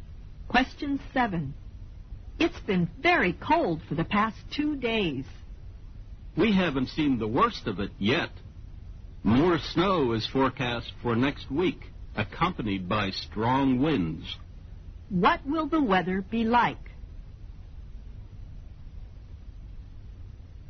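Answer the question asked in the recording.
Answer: Even colder, with more snow and strong winds next week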